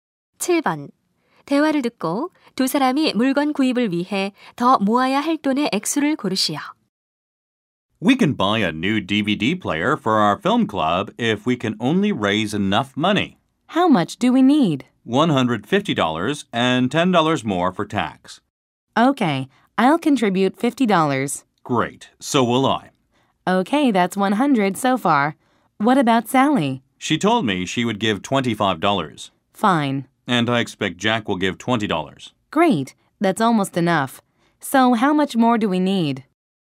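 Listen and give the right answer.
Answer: 15달러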